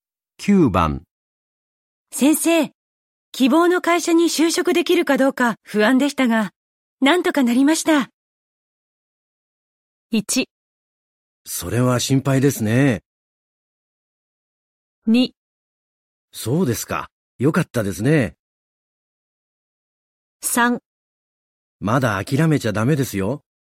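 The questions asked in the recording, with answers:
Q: 先生、希望の会社に就職できるかどうか不安でしたが、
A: 2: そうですか。よかったですね。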